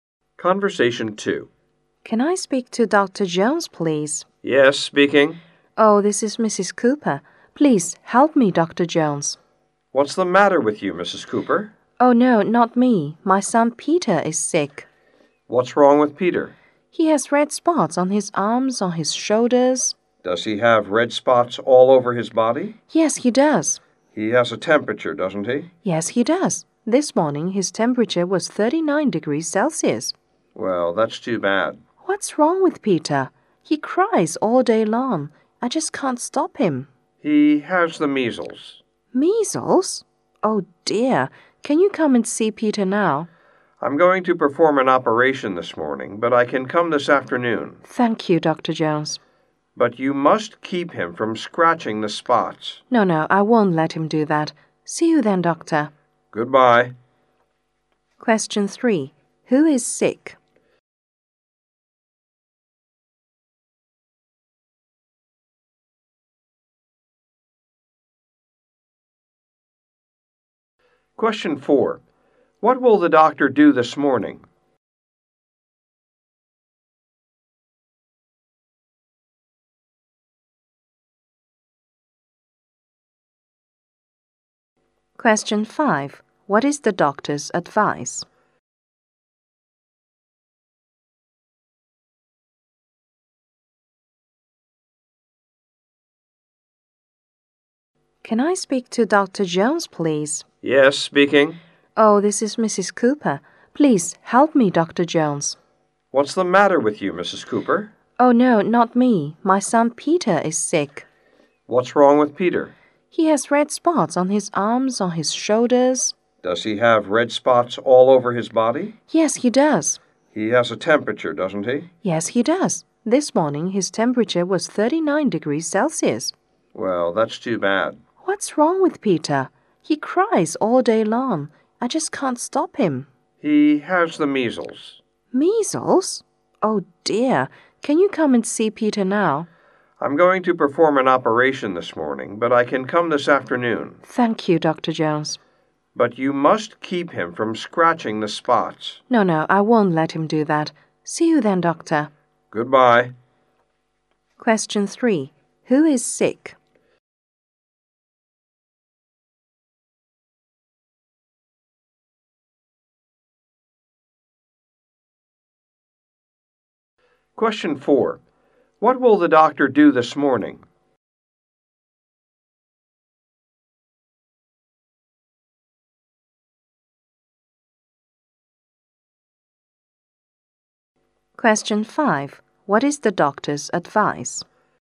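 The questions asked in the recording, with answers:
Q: Who is sick?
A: Peter, Mrs. Cooper's son

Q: What will the doctor do this morning?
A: Perform an operation

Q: What is the doctor's advice?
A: Keep Peter from scratching the spots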